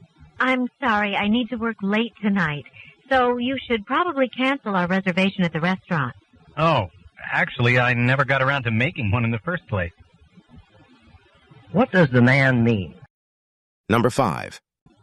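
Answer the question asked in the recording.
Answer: He never made a reservation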